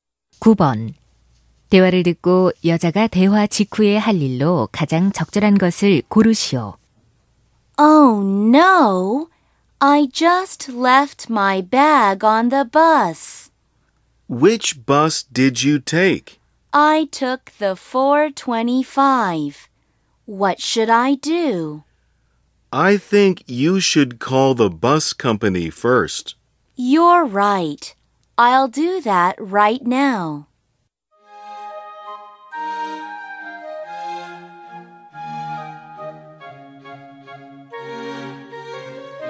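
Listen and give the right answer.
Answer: 버스 회사에 전화하기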